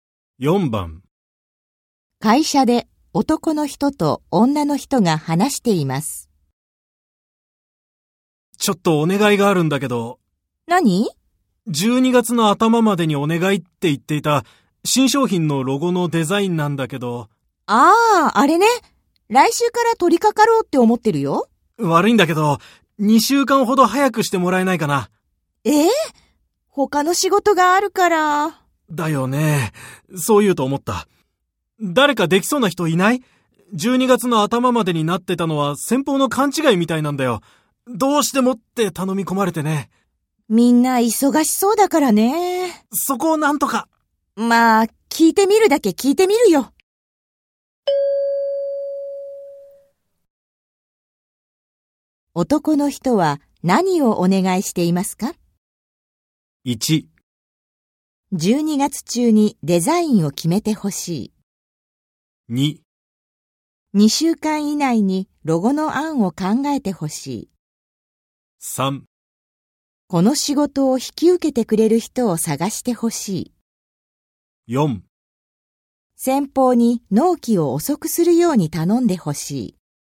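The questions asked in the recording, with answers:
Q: 男の人は何をお願いしていますか?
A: 3: この仕事を引き受けてくれる人を探してほしい。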